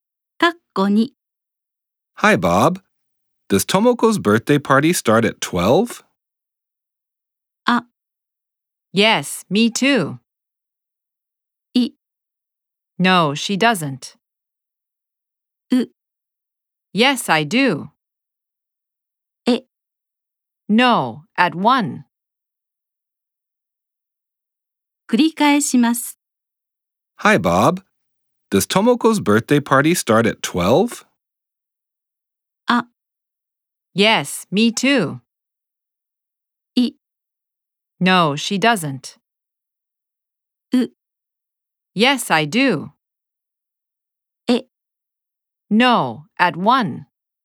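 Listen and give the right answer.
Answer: え: No, at 1.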